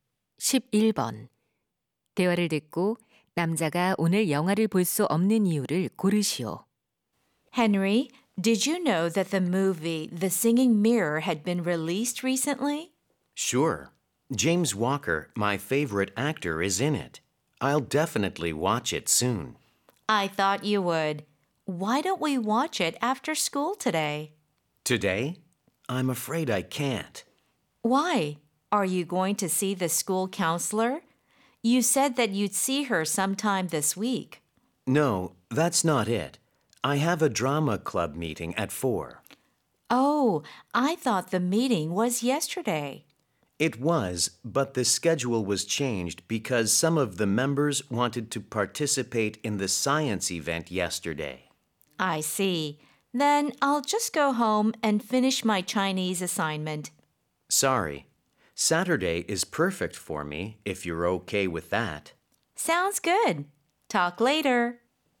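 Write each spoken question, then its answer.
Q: 대화를 듣고 남자가 오늘 영화를 볼 수 없는 이유를 고르시오.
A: 연극 동아리 모임이 있어서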